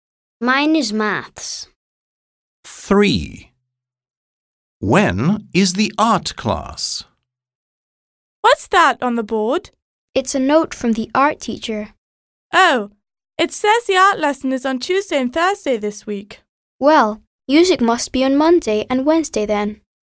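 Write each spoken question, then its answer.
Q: When is the art class?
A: On Tuesday and Thursday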